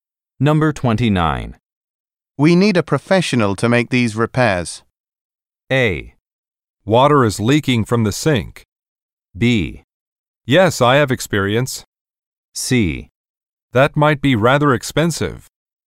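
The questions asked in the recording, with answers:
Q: We need a professional to make these repairs.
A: C: That might be rather expensive.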